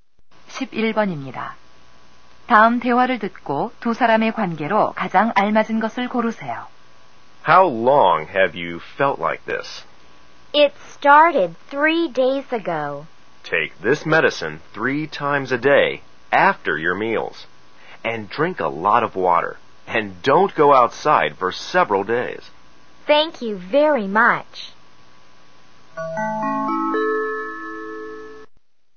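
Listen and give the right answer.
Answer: 의사와 환자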